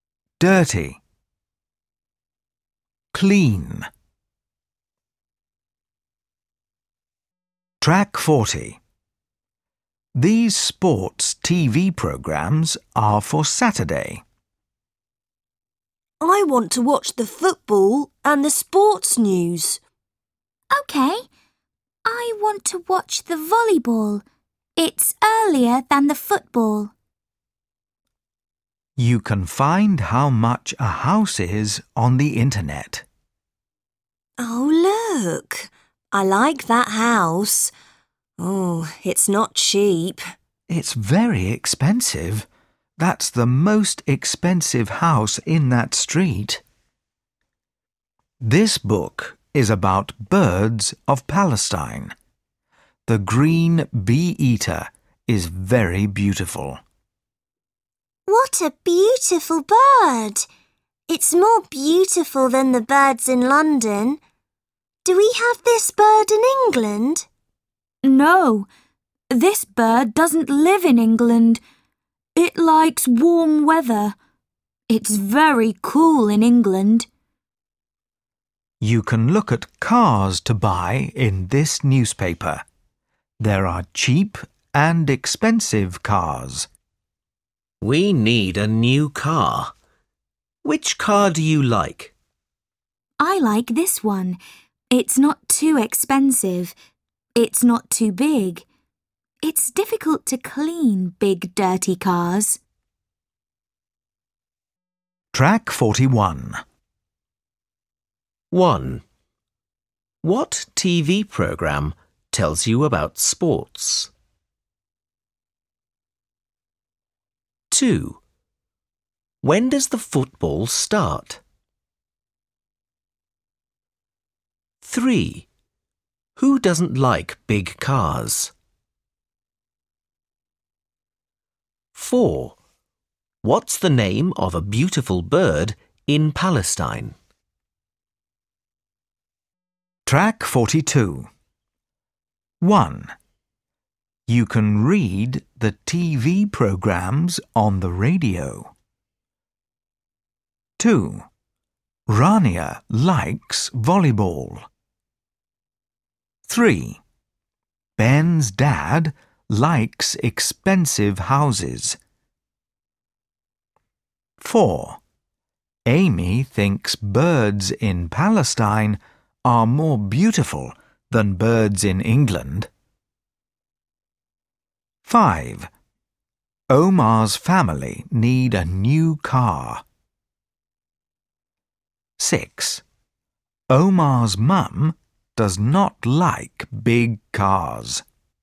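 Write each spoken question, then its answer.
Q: What TV program tells you about sports?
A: The sports news

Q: What's the name of a beautiful bird in Palestine?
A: The green bee-eater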